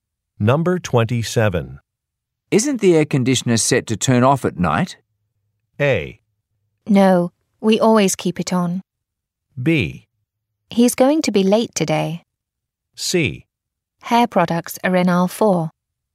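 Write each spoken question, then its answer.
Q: Isn't the air conditioner set to turn off at night?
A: A: No, we always keep it on.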